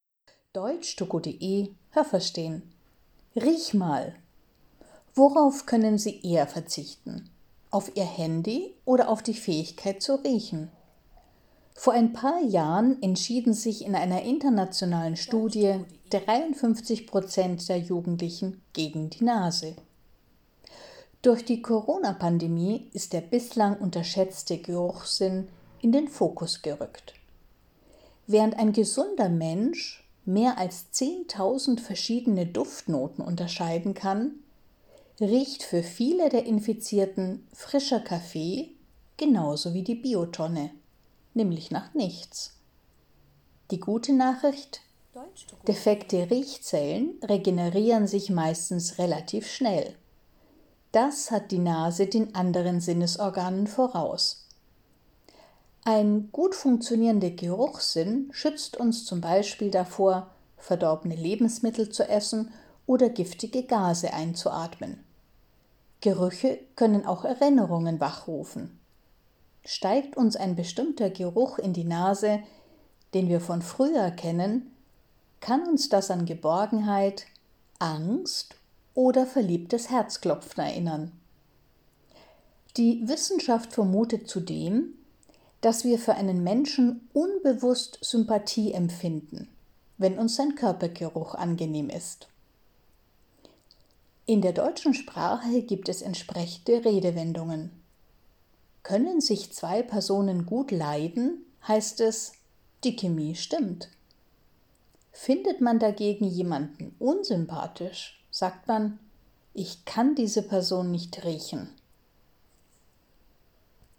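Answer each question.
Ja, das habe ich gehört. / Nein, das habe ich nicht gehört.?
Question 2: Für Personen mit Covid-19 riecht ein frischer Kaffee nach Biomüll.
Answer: Nein, das habe ich nicht gehört.

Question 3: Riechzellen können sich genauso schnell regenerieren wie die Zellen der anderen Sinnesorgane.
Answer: Nein, das habe ich nicht gehört.

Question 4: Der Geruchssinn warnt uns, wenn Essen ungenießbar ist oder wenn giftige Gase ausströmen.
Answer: Ja, das habe ich gehört.

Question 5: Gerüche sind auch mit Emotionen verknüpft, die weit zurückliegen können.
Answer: Ja, das habe ich gehört.

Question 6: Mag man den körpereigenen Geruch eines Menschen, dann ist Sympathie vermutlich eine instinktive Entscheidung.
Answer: Ja, das habe ich gehört.

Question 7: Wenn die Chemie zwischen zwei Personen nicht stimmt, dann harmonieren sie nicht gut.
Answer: Ja, das habe ich gehört.

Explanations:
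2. Infizierte Personen riechen weder den Kaffee noch die Biotonne.
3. Nur die Riechzellen können sich relativ schnell regenerieren.

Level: C1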